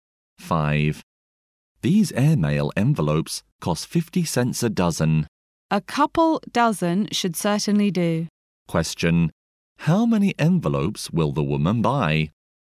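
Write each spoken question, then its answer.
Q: How many envelopes will the woman buy?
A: 24 (two dozen)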